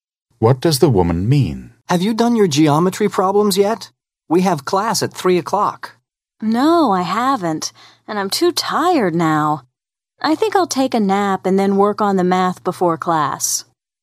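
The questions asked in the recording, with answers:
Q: What does the woman mean?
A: She will do the geometry problems after taking a nap.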